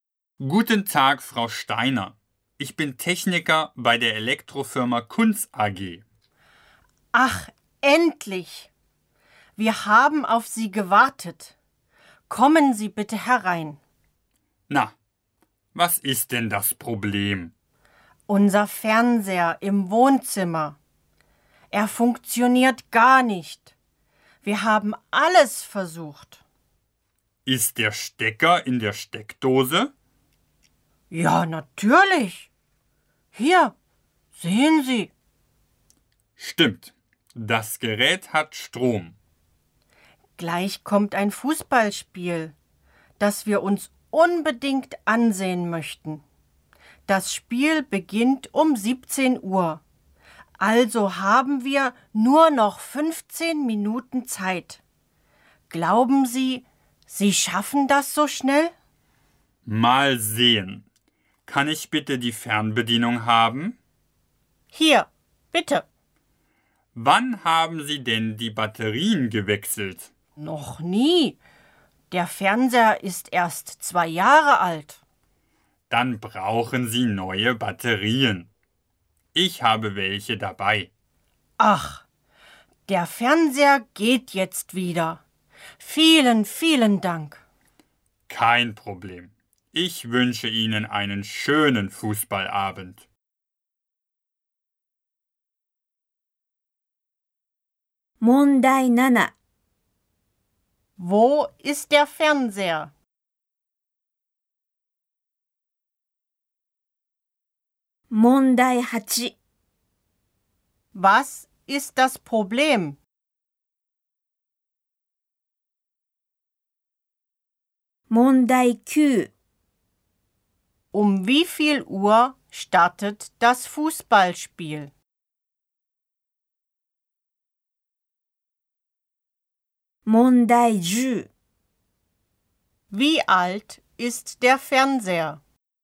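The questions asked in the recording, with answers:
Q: Wo ist der Fernseher?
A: Im Wohnzimmer

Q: Was ist das Problem?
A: Die Fernbedienung braucht neue Batterien

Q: Um wie viel Uhr startet das Fußballspiel?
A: Um 17 Uhr

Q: Wie alt ist der Fernseher?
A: 2 Jahre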